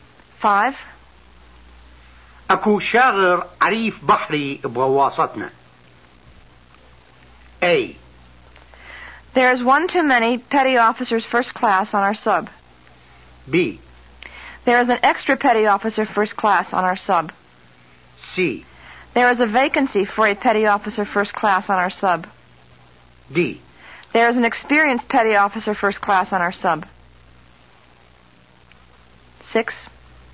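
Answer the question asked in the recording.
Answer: C: There is a vacancy for a petty officer first class on our sub.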